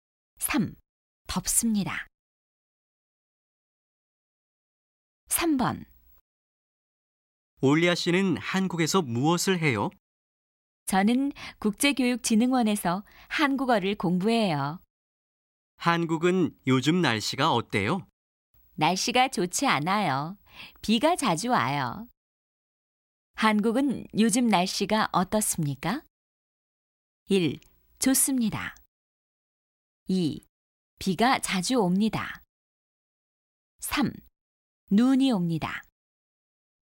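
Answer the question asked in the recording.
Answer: 2: 비가 자주 옵니다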